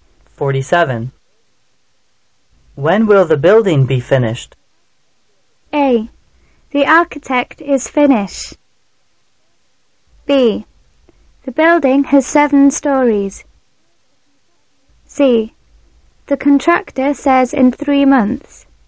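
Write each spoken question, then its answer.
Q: When will the building be finished?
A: C: The contractor says in 3 months.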